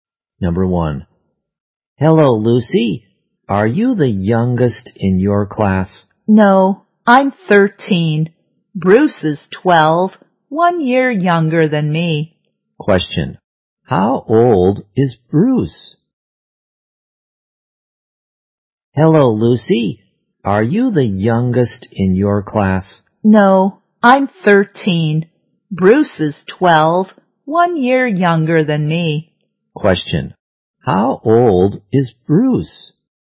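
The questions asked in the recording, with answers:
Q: How old is Bruce?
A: 12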